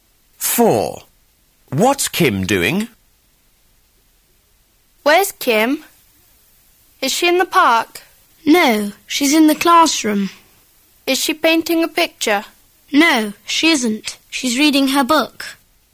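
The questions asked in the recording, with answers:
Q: What's Kim doing?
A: Reading her book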